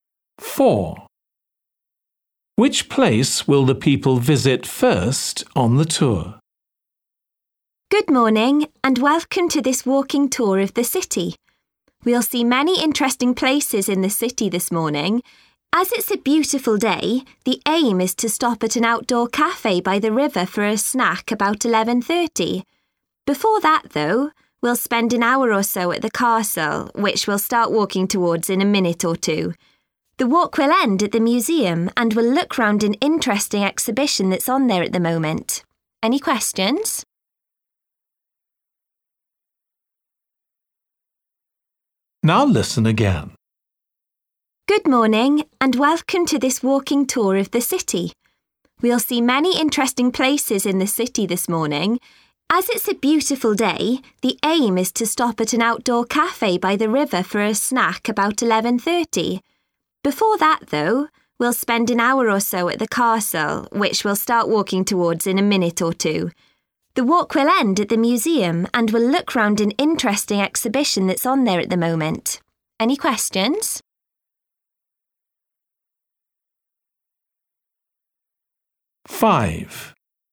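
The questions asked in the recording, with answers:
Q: Which place will the people visit first on the tour?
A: the castle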